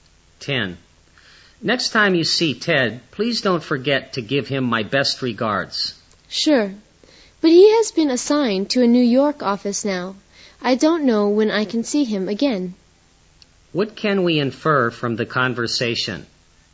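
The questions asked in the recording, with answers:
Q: What can we infer from the conversation?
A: Ted now works at a New York office, so the speaker may not see him soon.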